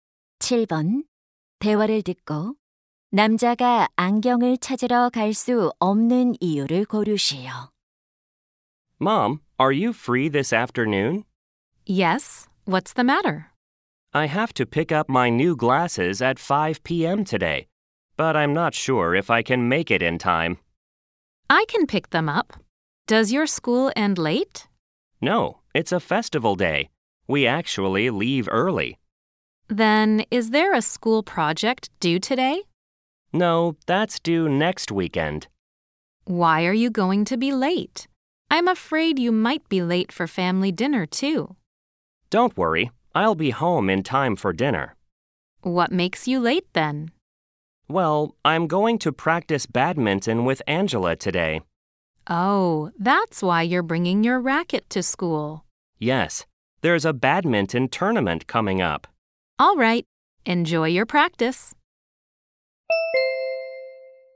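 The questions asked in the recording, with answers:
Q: 대화를 듣고 남자가 안경을 찾으러 갈 수 없는 이유를 고르시오.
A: Angela와 배드민턴 연습을 해야 해서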